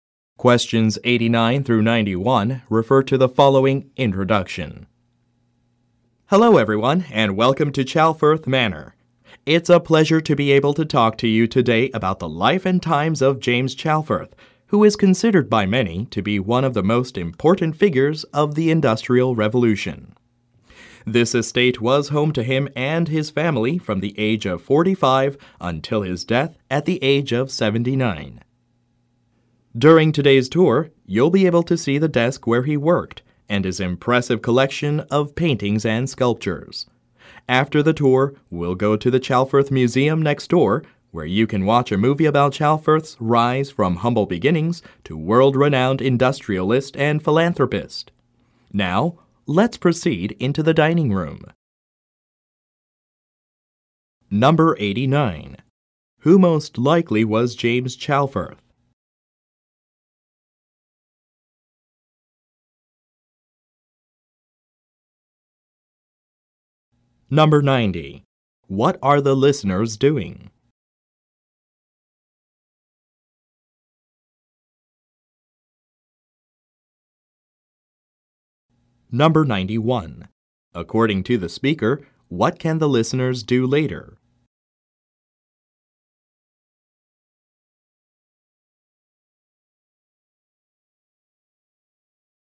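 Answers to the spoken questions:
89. An industrialist of the Industrial Revolution
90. Taking a tour of Chalfirth Manor
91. Watch a movie at the Chalfirth Museum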